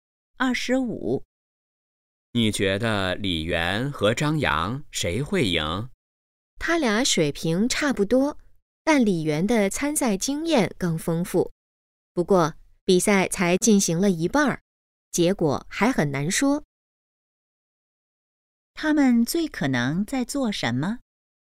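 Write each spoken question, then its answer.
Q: 他们最可能在做什么?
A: 看比赛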